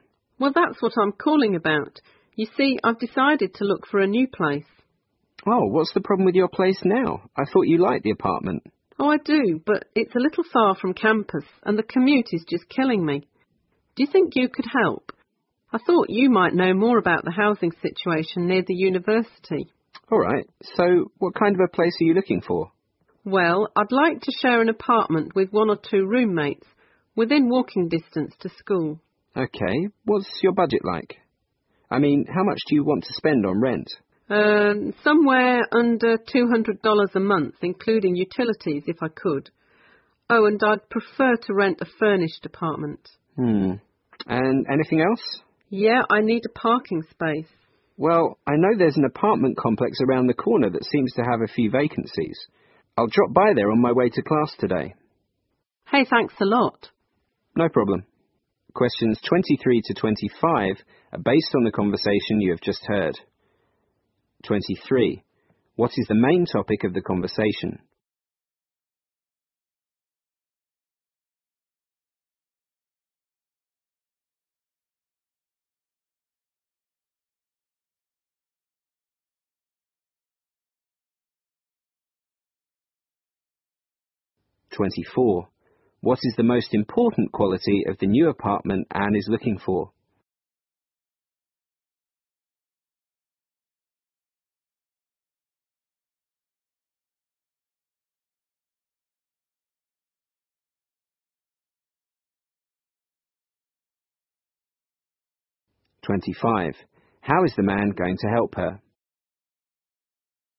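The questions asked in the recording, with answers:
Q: What is the main topic of the conversation?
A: Anne is looking for a new apartment

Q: How is the man going to help her?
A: He will stop by a nearby apartment complex with vacancies on his way to class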